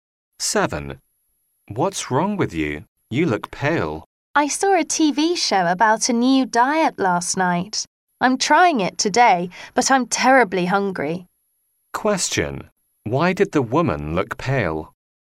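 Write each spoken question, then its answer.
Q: Why did the woman look pale?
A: She is on a new diet and is very hungry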